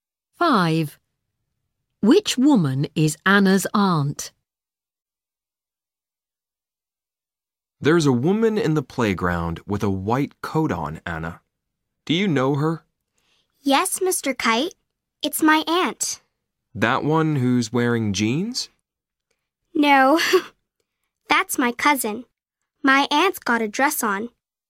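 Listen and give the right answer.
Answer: the one with a white coat and a dress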